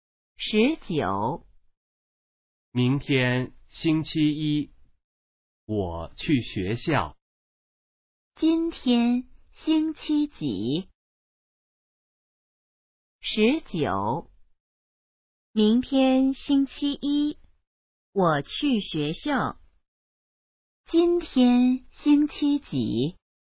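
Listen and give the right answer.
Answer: 星期日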